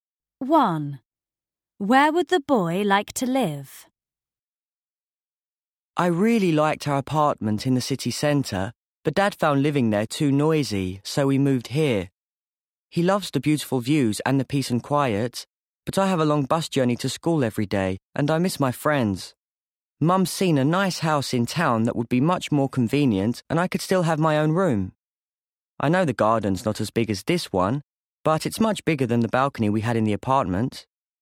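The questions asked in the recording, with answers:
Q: Where would the boy like to live?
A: In a house in town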